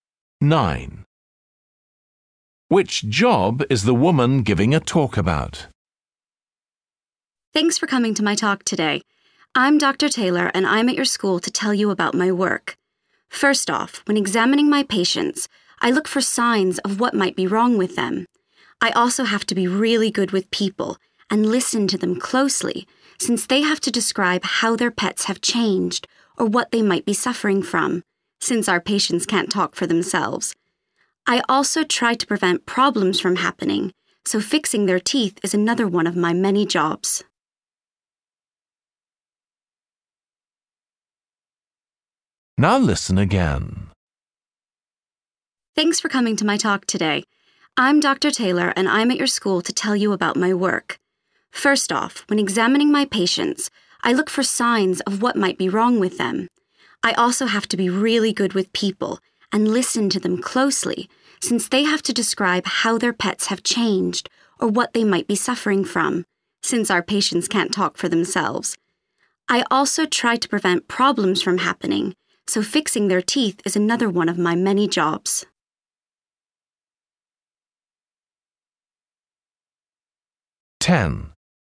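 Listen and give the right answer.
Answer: vet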